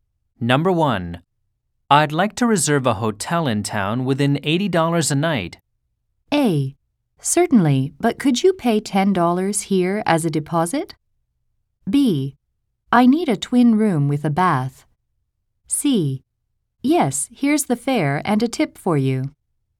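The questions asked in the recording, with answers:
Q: I'd like to reserve a hotel in town within $80 a night.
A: A: Certainly, but could you pay $10 here as a deposit?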